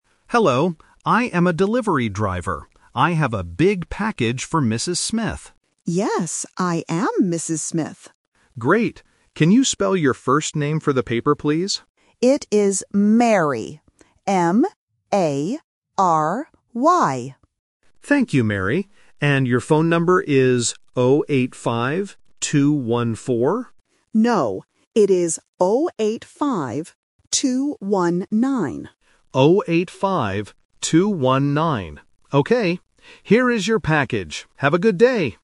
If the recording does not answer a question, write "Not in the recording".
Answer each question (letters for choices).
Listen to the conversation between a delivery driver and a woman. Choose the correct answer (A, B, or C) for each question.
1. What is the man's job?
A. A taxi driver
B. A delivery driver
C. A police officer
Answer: B

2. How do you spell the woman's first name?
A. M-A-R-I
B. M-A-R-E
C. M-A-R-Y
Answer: C

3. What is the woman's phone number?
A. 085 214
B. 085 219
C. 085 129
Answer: B

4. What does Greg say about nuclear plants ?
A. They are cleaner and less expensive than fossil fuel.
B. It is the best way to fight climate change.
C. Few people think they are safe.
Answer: Not in the recording

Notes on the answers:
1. The man clearly introduces himself at the beginning: "I am a delivery driver." Options (A) and (C) are other jobs that are not mentioned in the audio.
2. The woman spells her first name very clearly: "M-A-R-Y". Options (A) and (B) are distractors with incorrect ending letters.
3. The woman corrects the driver by saying: "No, it is 0-8-5, 2-1-9." Option (A) is the trap because the driver reads this number first, but it is wrong. Option (C) has mixed-up numbers.

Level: A1